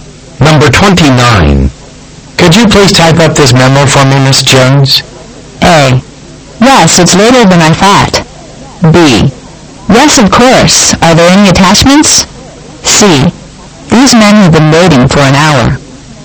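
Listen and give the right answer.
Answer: B: Yes, of course. Are there any attachments?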